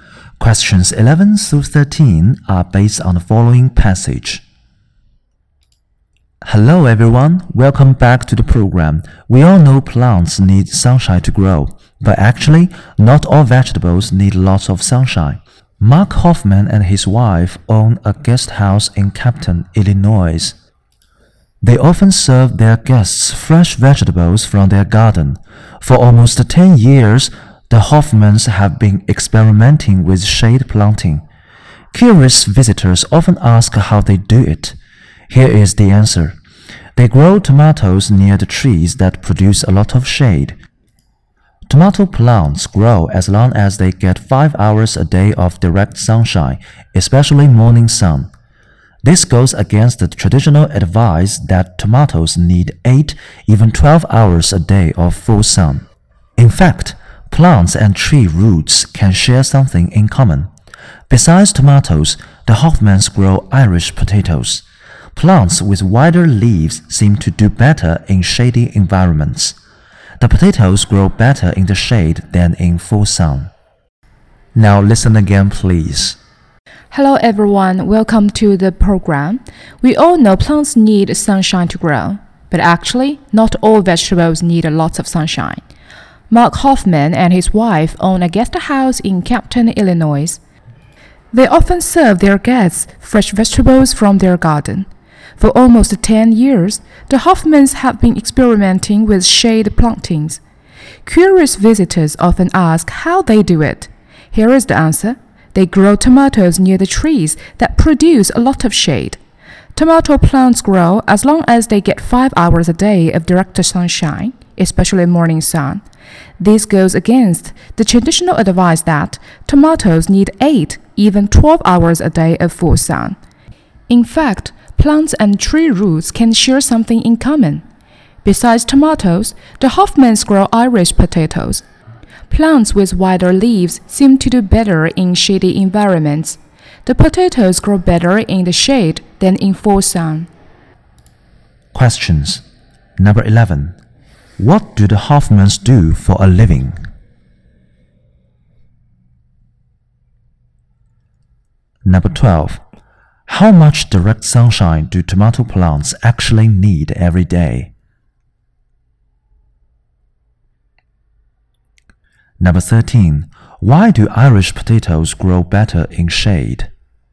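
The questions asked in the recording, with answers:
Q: What do the Hoffmans do for a living?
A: They run a guest house

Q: How much direct sunshine do tomato plants actually need every day?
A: Five hours

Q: Why do Irish potatoes grow better in shade?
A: Because they have wider leaves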